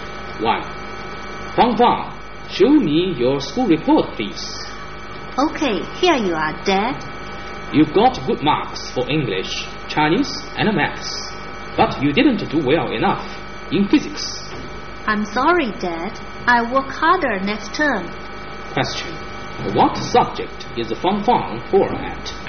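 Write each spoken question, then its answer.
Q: What subject is Fang Fang poor at?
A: Physics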